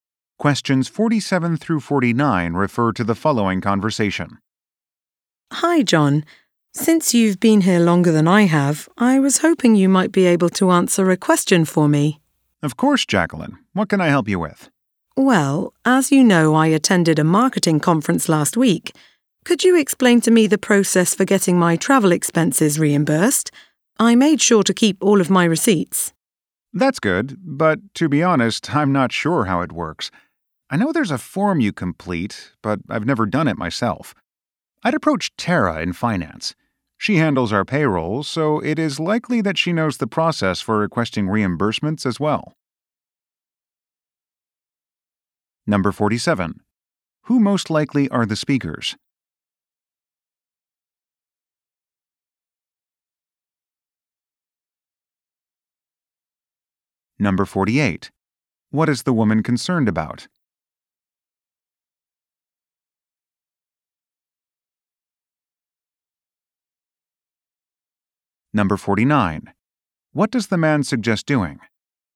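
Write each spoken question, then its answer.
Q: What is the woman concerned about?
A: Getting her travel expenses reimbursed

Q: What does the man suggest doing?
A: Asking Tara in finance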